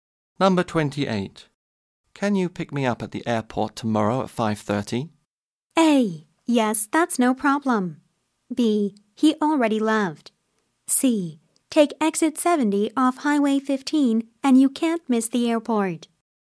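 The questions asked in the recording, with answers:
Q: Can you pick me up at the airport tomorrow at 5:30?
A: A: Yes, that's no problem.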